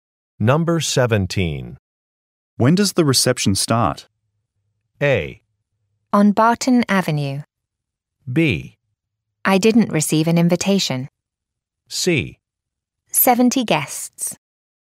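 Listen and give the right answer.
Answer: B: I didn't receive an invitation.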